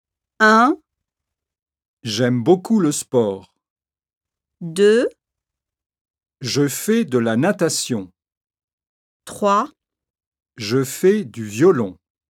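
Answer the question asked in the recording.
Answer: 2: Je fais de la natation.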